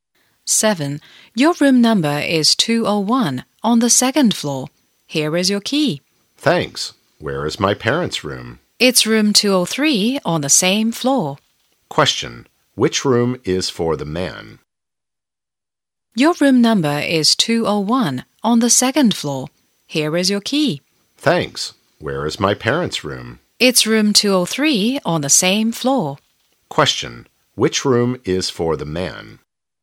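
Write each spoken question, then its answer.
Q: Which room is for the man?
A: Room 201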